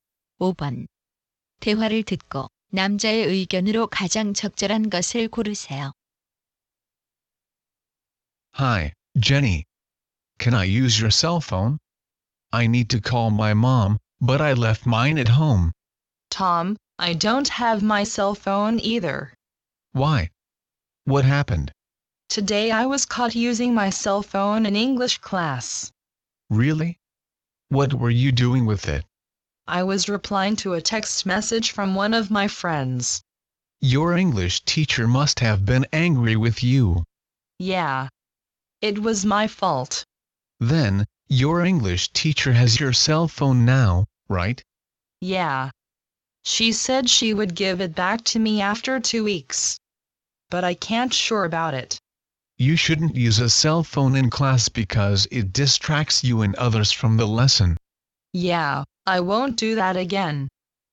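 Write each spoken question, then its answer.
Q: 대화를 듣고 남자의 의견으로 가장 적절한 것을 고르세요.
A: 수업 중에 휴대전화를 사용해서는 안 된다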